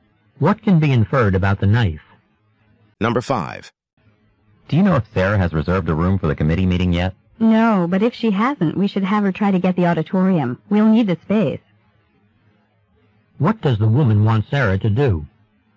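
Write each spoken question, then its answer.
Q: What does the woman want Sarah to do?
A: Try to reserve the auditorium.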